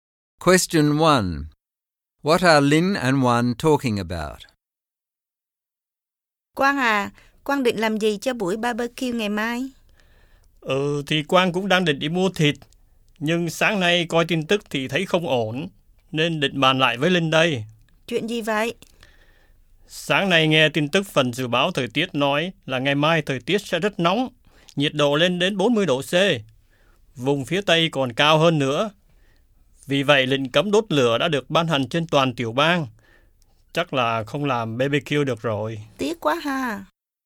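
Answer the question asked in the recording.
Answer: Their barbecue planned for tomorrow, which probably can't go ahead: the forecast is for 40°C heat and a statewide total fire ban has been declared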